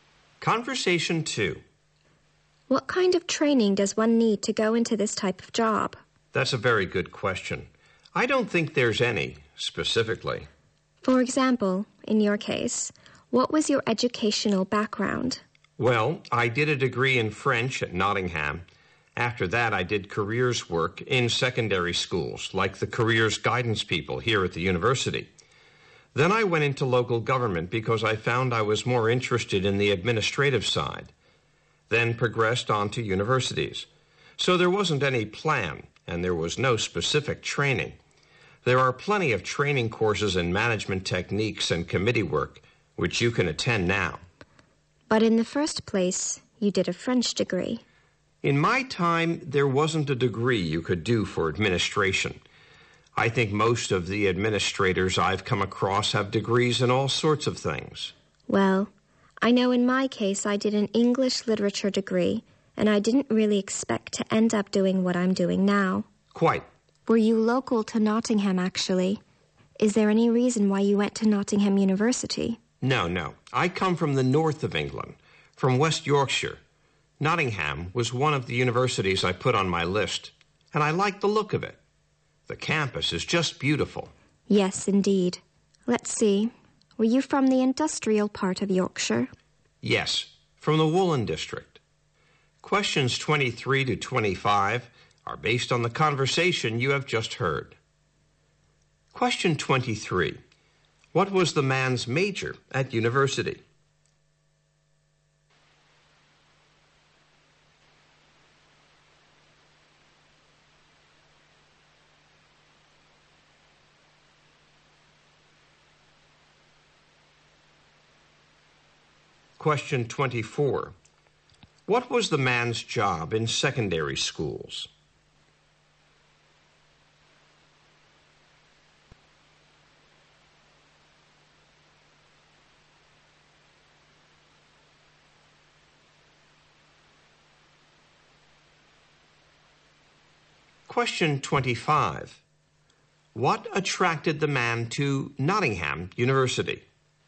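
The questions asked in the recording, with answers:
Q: What was the man's major at university?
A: French

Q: What was the man's job in secondary schools?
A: Careers work (careers guidance)

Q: What attracted the man to Nottingham University?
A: Its beautiful campus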